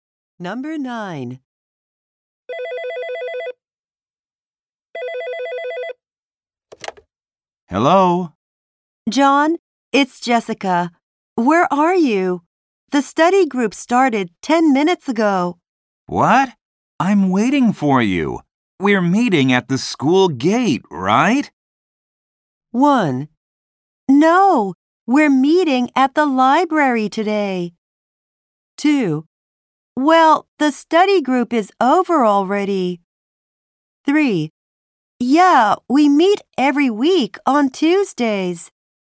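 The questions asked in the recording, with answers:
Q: We're meeting at the school gate, right?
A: 1: No, we're meeting at the library today.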